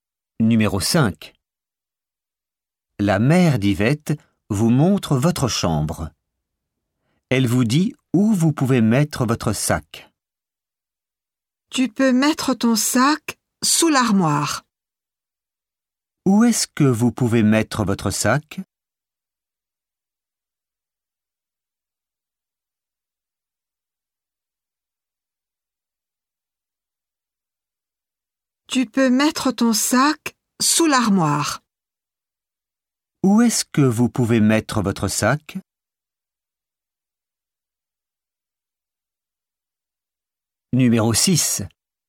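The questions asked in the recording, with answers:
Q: Où est-ce que vous pouvez mettre votre sac?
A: Sous l'armoire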